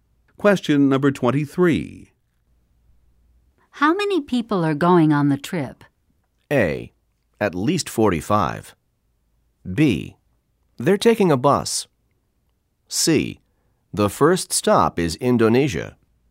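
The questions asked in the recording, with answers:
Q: How many people are going on the trip?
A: A: At least 45.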